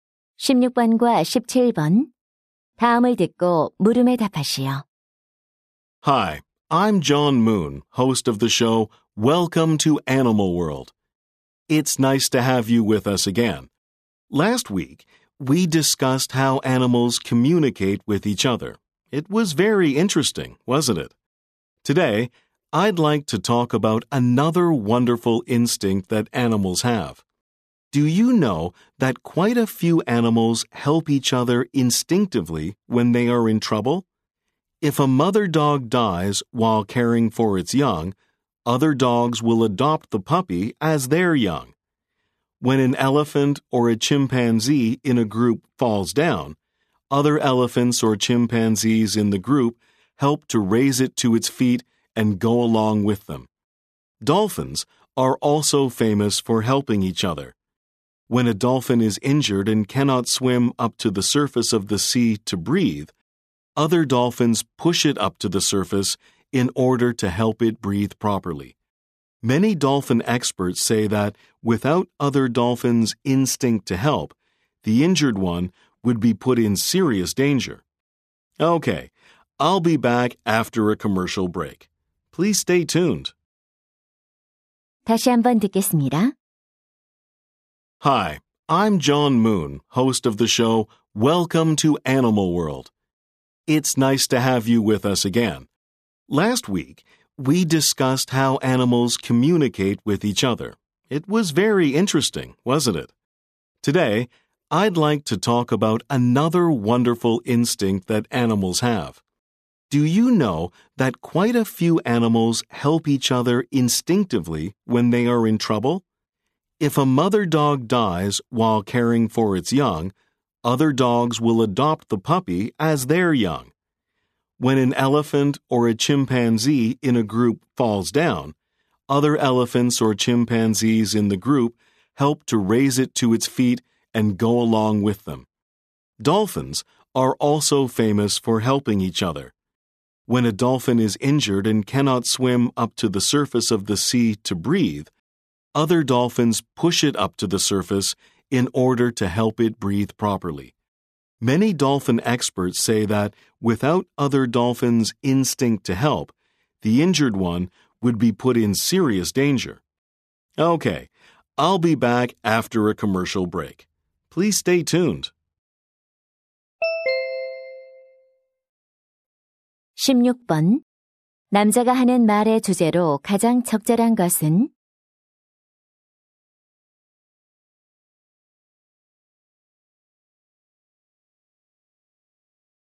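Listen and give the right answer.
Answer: 곤경에 처한 동료를 본능적으로 돕는 동물들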